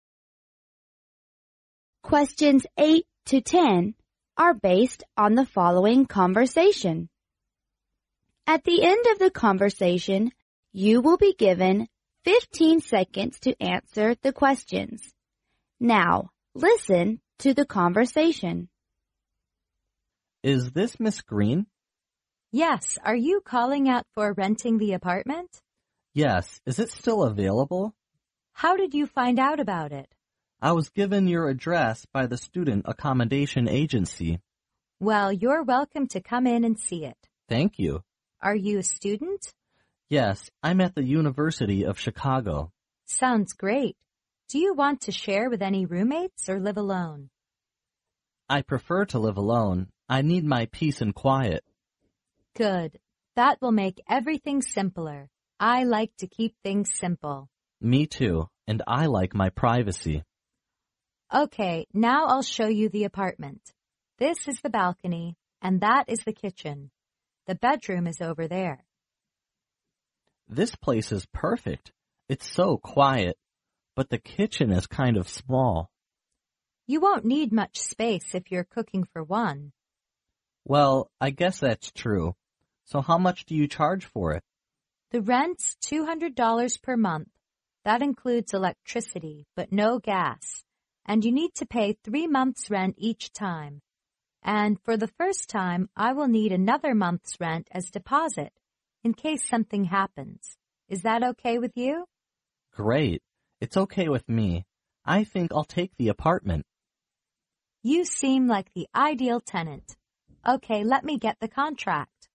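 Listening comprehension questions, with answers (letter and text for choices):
In this section you hear several conversations. Listen to the conversations carefully and then answer the questions that follow.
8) How does the man know Ms. Green's apartment is available for renting?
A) By calling at the renting department.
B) From roommate's space.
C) From the Chicago University student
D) Through the student accommodation agency.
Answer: D) Through the student accommodation agency.

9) Which of the following details about the apartment is INCORRECT?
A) The apartment's, owner prefers that the man rent the apartment by himself.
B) The apartment's rent includes electricity and gas fee.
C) The apartment has a balcony, a kitchen and a bedroom.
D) The apartments kitchen is a little bit small.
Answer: B) The apartment's rent includes electricity and gas fee.

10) How much would the man pay first if he wants to rent the apartment?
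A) $800.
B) $200.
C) $600.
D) $1200.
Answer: A) $800.

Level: 英语四级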